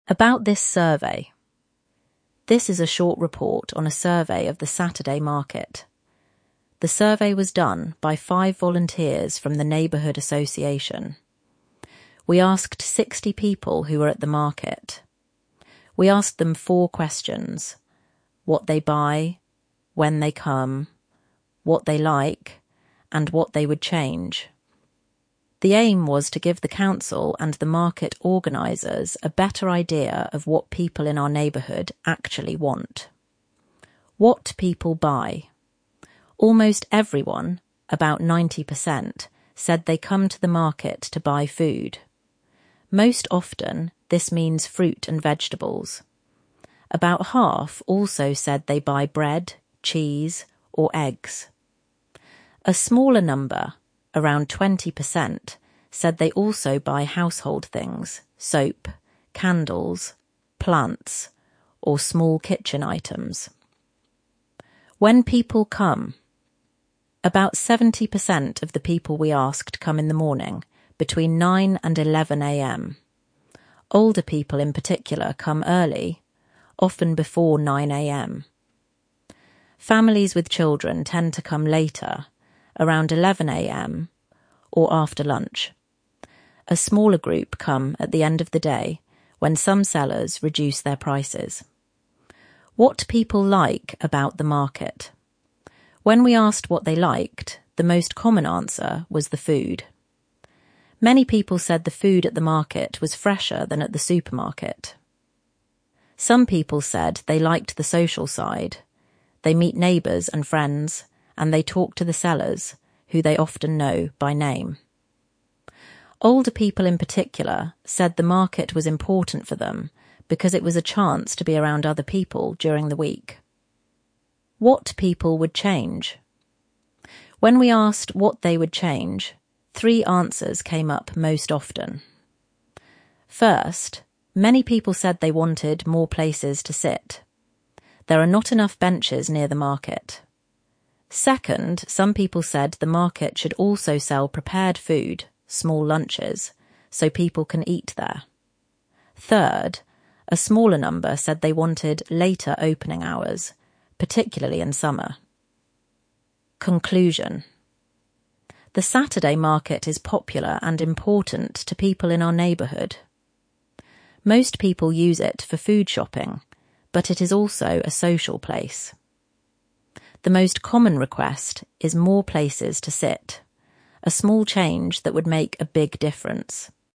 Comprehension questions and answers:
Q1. What four questions did the volunteers ask?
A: What people buy, when they come, what they like, and what they would change.

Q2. What was the aim of the survey?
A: To give the council and the market organisers a better idea of what people in the neighbourhood actually want.

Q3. What do almost all the people come to the market to buy?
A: Food — about 90% said this. Most commonly fruit and vegetables.

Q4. What proportion of people also buy bread, cheese, or eggs?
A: About half (around 50%).

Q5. When do older people typically come to the market?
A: Early — often before 9 a.m.

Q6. What two things do many people like about the market?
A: (1) The food, which they say is fresher than at the supermarket. (2) The social side — meeting neighbours and friends, talking to sellers they know by name.

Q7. What did older people in particular say about the market?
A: That it was important for them because it was a chance to be around other people during the week.

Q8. What three changes did people most often suggest?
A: (1) More places to sit. (2) Selling prepared food (small lunches). (3) Later opening hours, particularly in summer.

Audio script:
ABOUT THIS SURVEY
This is a short report on a survey of the Saturday market. The survey was done by five volunteers from the neighbourhood association. We asked 60 people who were at the market. We asked them four questions: what they buy, when they come, what they like, and what they would change.
The aim was to give the council and the market organisers a better idea of what people in our neighbourhood actually want.
WHAT PEOPLE BUY
Almost everyone (about 90%) said they come to the market to buy food. Most often, this means fruit and vegetables. About half also said they buy bread, cheese, or eggs. A smaller number (around 20%) said they also buy household things — soap, candles, plants, or small kitchen items.
WHEN PEOPLE COME
About 70% of the people we asked come in the morning, between 9 and 11 a.m. Older people in particular come early, often before 9 a.m. Families with children tend to come later, around 11 a.m. or after lunch. A smaller group come at the end of the day, when some sellers reduce their prices.
WHAT PEOPLE LIKE ABOUT THE MARKET
When we asked what they liked, the most common answer was the food. Many people said the food at the market was fresher than at the supermarket. Some people said they liked the social side — they meet neighbours and friends, and they talk to the sellers, who they often know by name.
Older people in particular said the market was important for them because it was a chance to be around other people during the week.
WHAT PEOPLE WOULD CHANGE
First, many people said they wanted more places to sit. There are not enough benches near the market.
Second, some people said the market should also sell prepared food (small lunches), so people can eat there.
Third, a smaller number said they wanted later opening hours, particularly in summer.
CONCLUSION
The Saturday market is popular and important to people in our neighbourhood. Most people use it for food shopping, but it is also a social place. The most common request is more places to sit — a small change that would make a big difference.